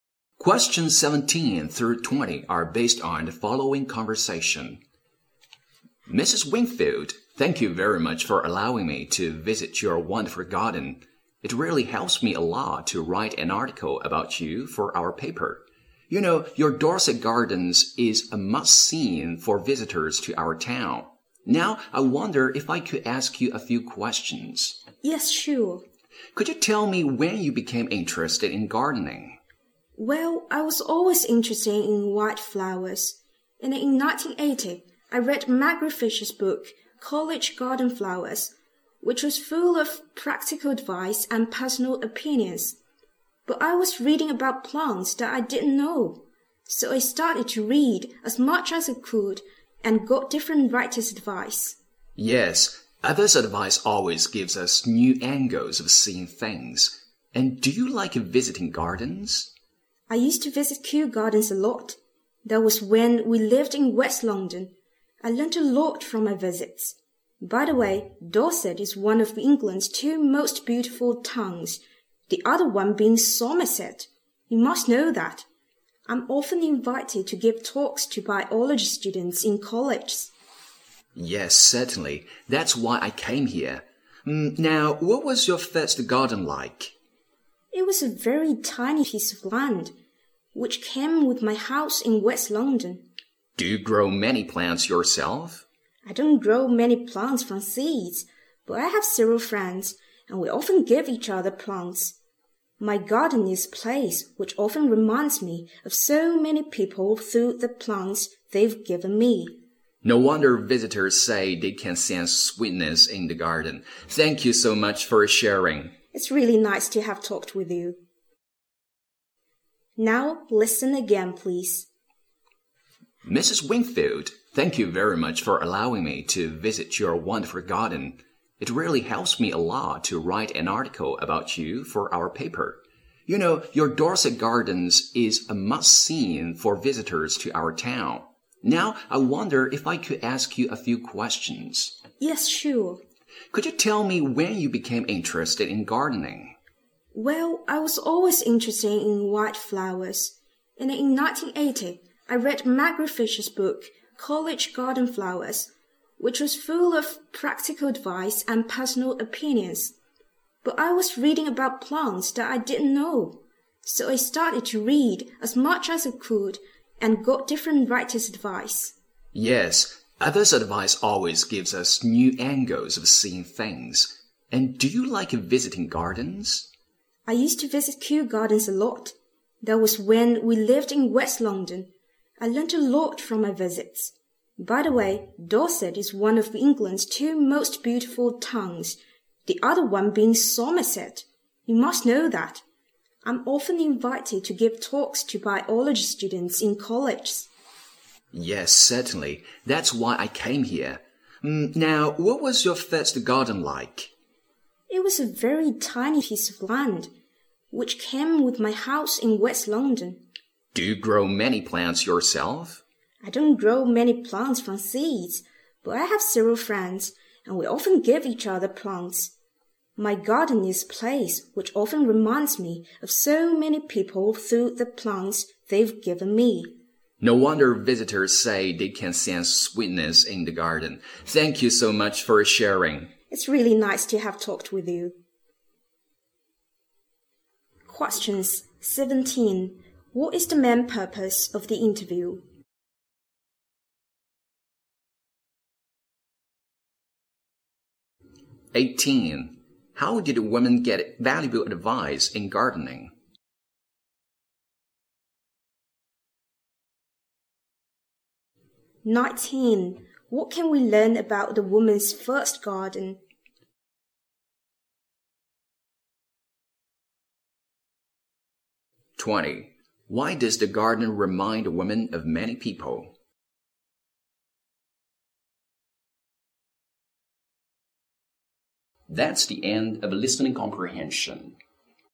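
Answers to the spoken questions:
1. To collect material for a newspaper article about her.
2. By reading different writers' books.
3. It was a tiny piece of land by her house in West London.
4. Many of its plants were given by friends.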